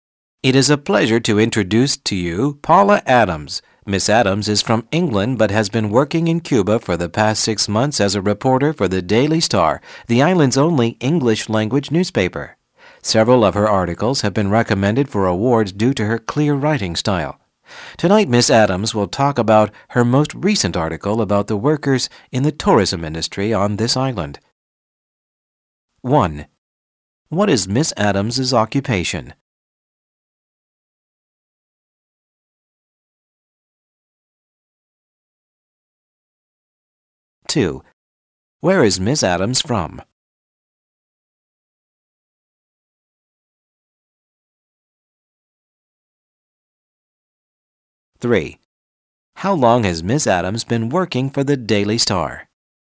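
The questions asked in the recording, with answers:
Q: What is Miss Adams' occupation?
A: Reporter

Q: Where is Miss Adams from?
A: England

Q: How long has Miss Adams been working for the Daily Star?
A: Six months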